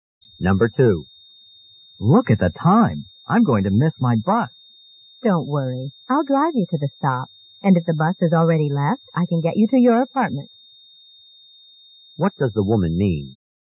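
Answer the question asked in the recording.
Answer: She will drive the man to the bus stop, or home if he misses the bus.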